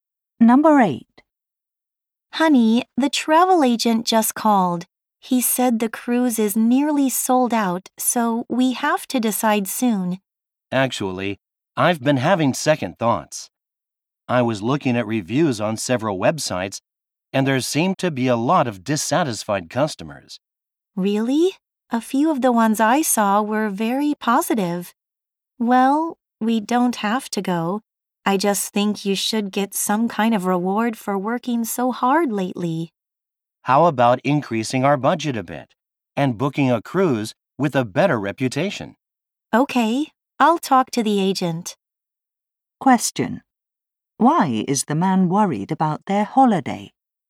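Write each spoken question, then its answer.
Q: Why is the man worried about their holiday?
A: Many customers left negative reviews of the cruise.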